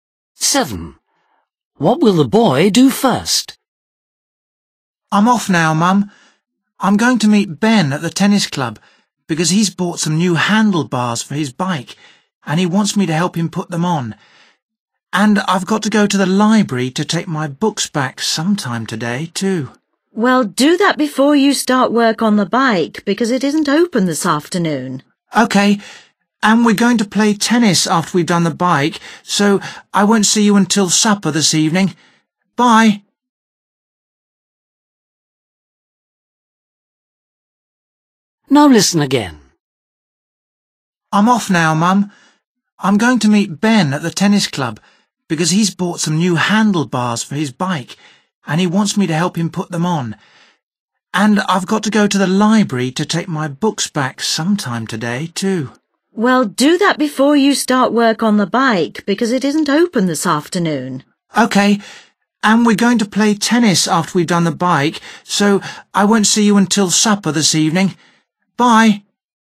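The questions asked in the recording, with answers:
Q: What will the boy do first?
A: take his books back to the library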